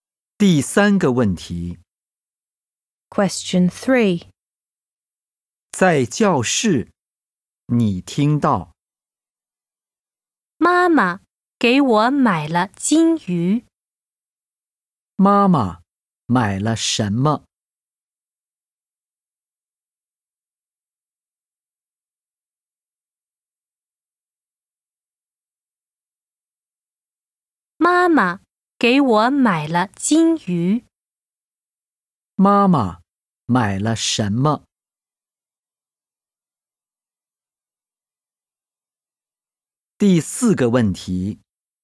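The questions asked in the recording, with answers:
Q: 妈妈买了什么?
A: 金鱼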